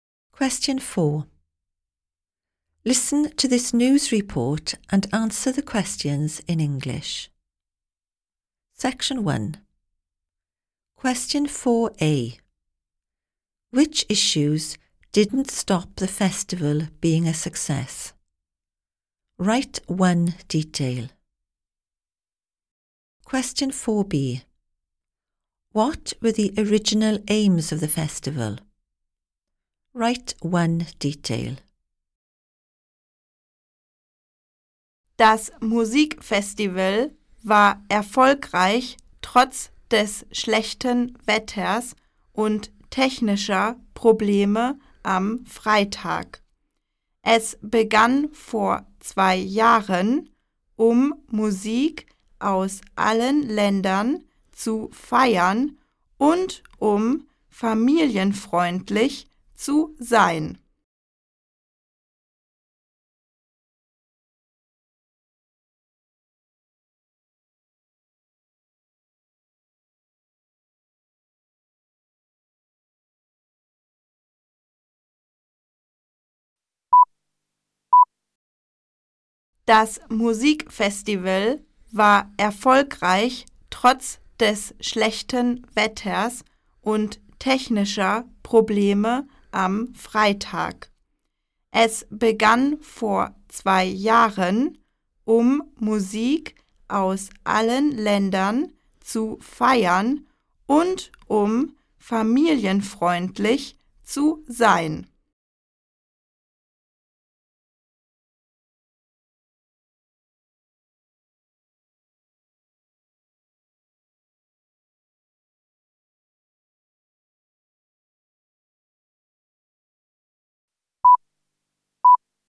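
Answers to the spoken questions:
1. Bad weather and technical problems on Friday
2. To celebrate music from all countries and to be family-friendly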